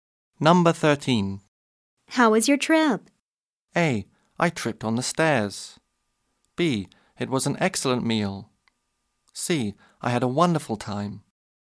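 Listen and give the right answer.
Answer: C: I had a wonderful time.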